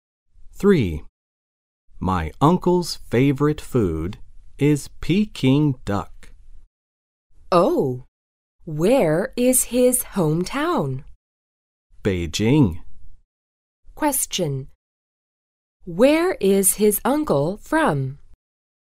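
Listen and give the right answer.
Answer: Beijing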